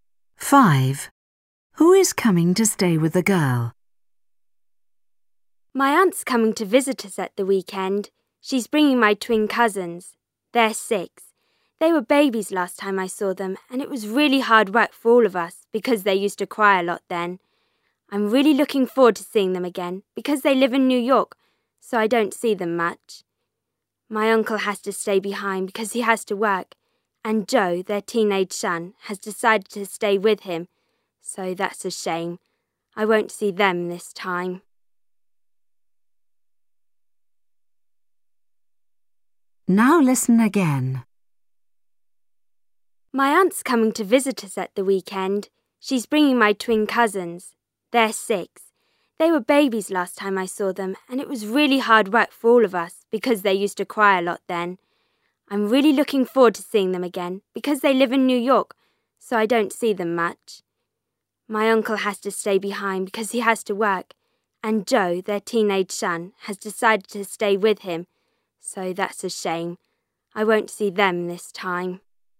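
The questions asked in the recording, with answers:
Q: Who is coming to stay with the girl?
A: Her aunt and her six-year-old twin cousins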